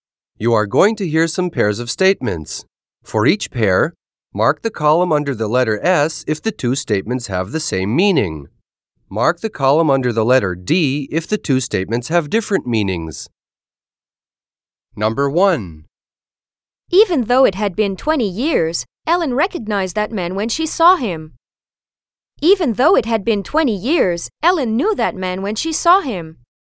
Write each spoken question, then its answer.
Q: Even though it had been 20 years, Ellen recognized that man when she saw him.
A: Same as the correct answer.